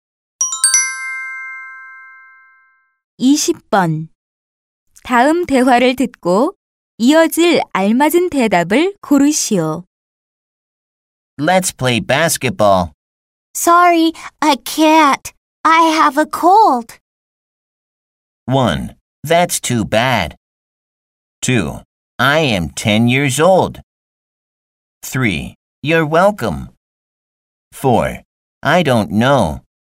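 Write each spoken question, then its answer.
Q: 다음 대화를 듣고 이어질 알맞은 대답을 고르시오.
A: 1: That's too bad.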